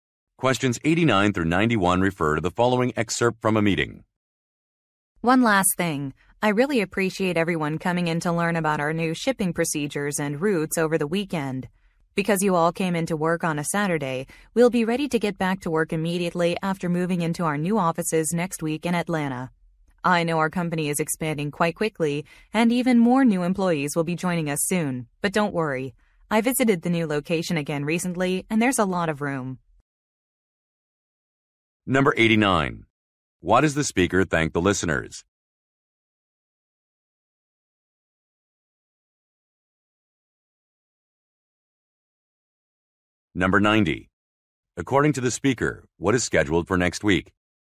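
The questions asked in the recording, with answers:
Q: Why does the speaker thank the listeners?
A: They came in on a Saturday for training on new procedures.

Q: According to the speaker, what is scheduled for next week?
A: Moving to new offices in Atlanta.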